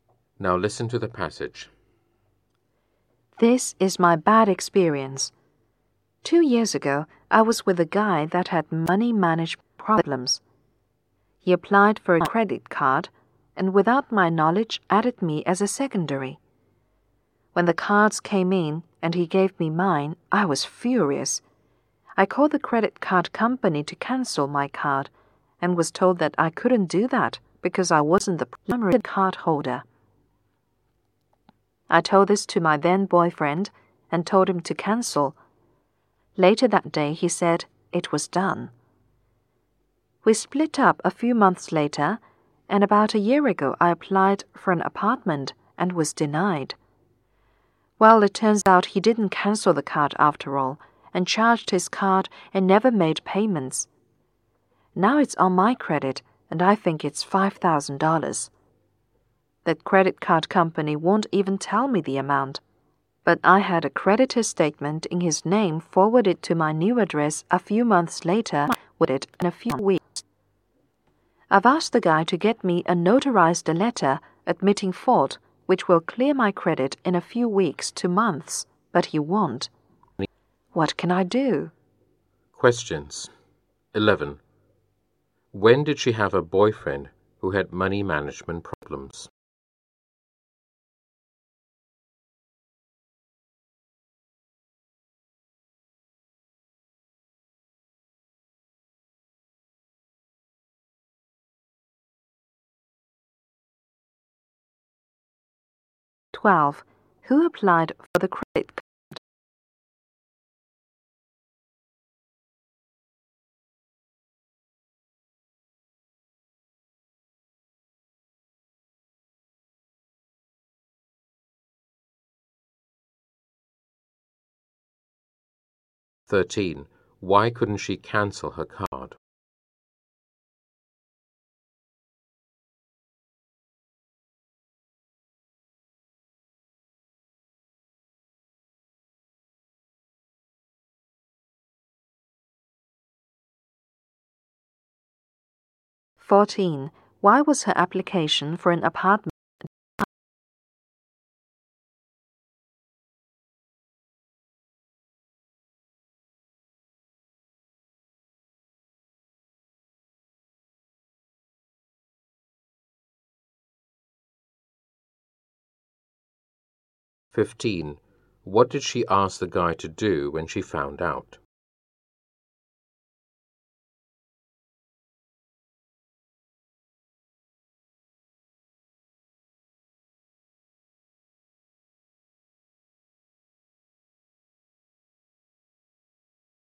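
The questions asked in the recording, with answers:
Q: When did she have a boyfriend who had money management problems?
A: Two years ago

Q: Who applied for the credit card?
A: Her boyfriend

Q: Why couldn't she cancel her card?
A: She wasn't the primary card holder

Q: Why was her application for an apartment denied?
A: Her ex-boyfriend's unpaid card charges were on her credit

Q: What did she ask the guy to do when she found out?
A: Get her a notarized letter admitting fault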